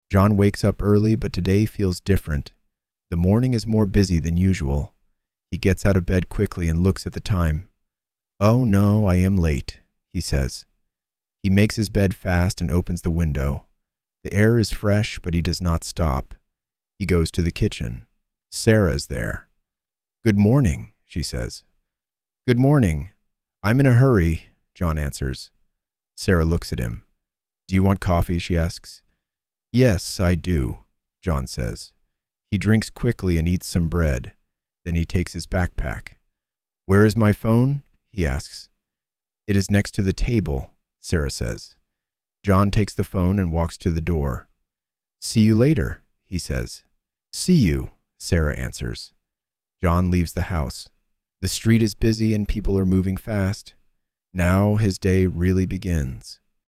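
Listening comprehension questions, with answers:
Responda em inglês:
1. Why is the morning different?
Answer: It is more busy than usual.

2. Is John late?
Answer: Yes, he is.

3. What does Sarah offer?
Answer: Coffee

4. What does John drink?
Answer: Coffee

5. Where is the phone?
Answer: Next to the table

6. How is the street?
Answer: Busy, and people are moving fast

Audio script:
John wakes up early, but today feels different. The morning is more busy than usual.
He gets out of bed quickly and looks at the time.
"Oh no, I am late," he says.
He makes his bed fast and opens the window.
The air is fresh, but he does not stop.
He goes to the kitchen.
Sarah is there.
"Good morning," she says.
"Good morning... I am in a hurry," John answers.
Sarah looks at him.
"Do you want coffee?" she asks.
"Yes, I do," John says.
He drinks quickly and eats some bread.
Then he takes his backpack.
"Where is my phone?" he asks.
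"It is next to the table," Sarah says.
John takes the phone and walks to the door.
"See you later," he says.
"See you," Sarah answers.
John leaves the house.
The street is busy, and people are moving fast.
Now his day really begins.

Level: Inglês Básico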